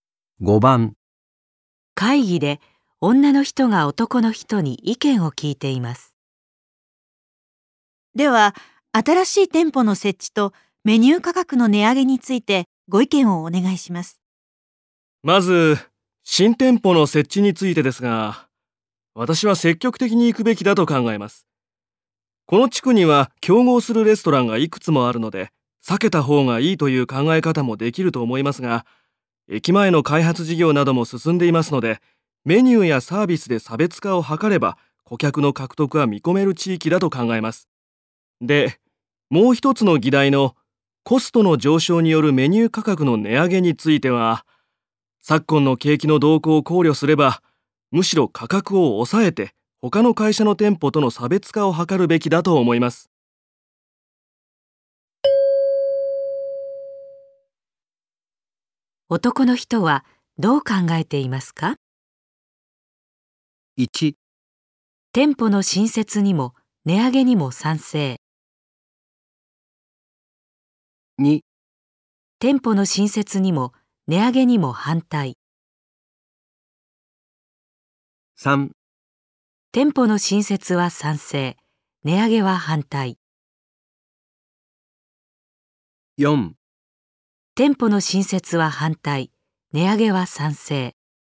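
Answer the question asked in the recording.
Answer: 3: 店舗の新設は賛成、値上げは反対。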